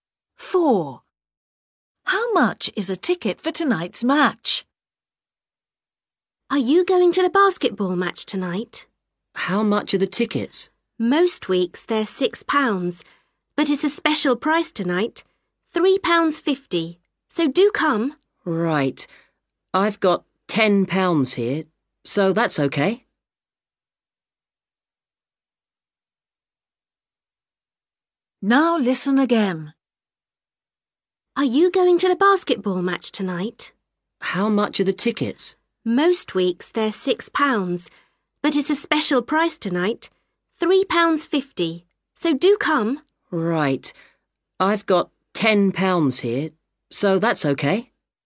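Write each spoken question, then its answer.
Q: How much is a ticket for tonight's match?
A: £3.50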